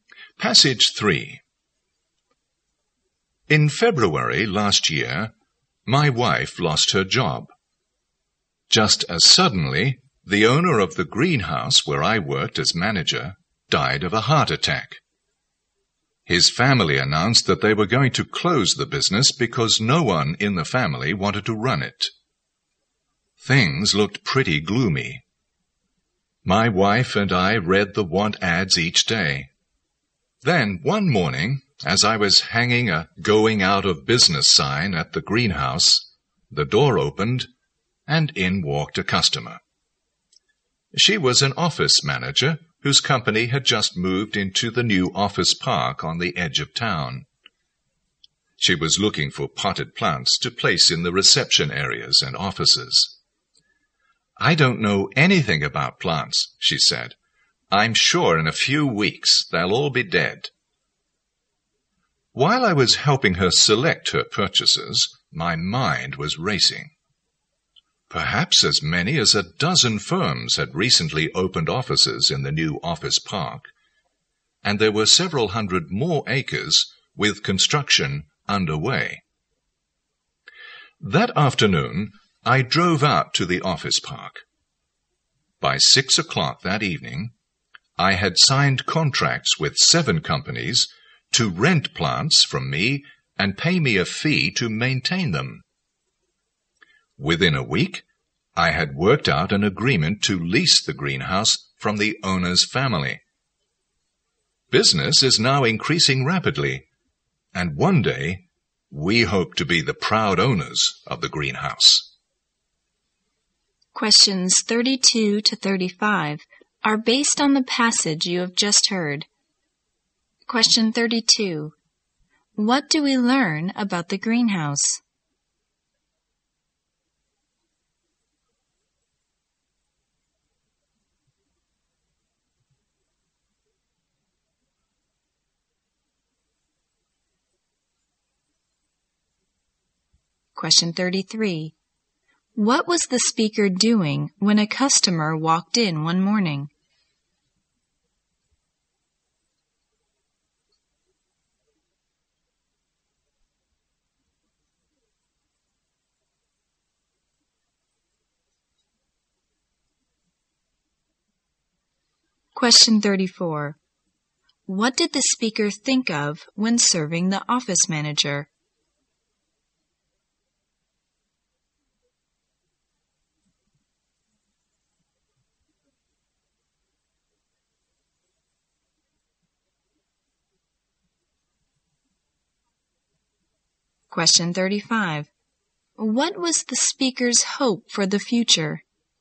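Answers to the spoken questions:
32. It was going to be closed
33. Hanging a going-out-of-business sign
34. Renting and maintaining plants for the many firms in the new office park
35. To own the greenhouse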